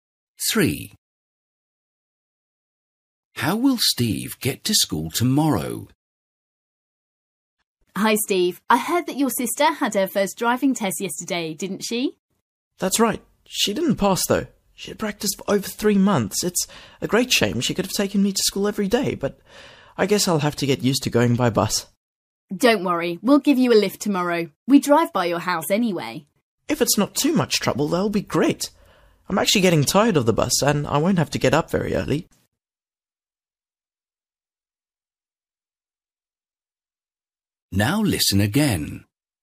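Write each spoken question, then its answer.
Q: How will Steve get to school tomorrow?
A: By car (he will get a lift)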